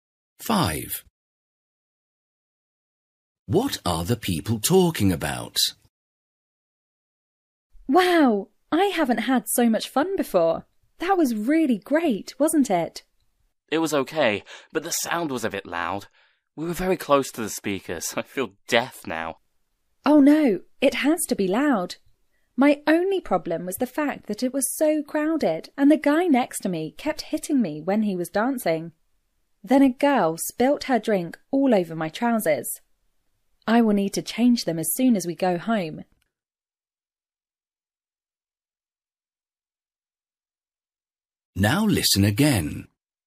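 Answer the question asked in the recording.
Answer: A concert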